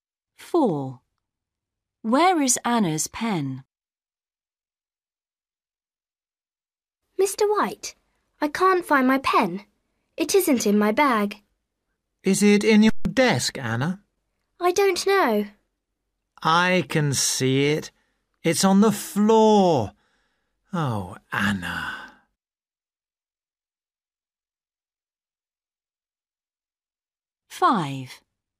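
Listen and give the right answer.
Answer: On the floor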